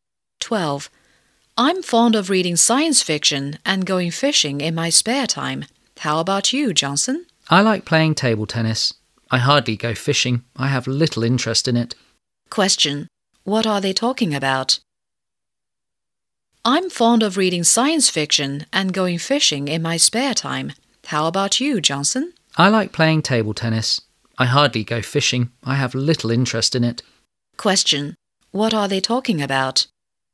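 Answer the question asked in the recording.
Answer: Their hobbies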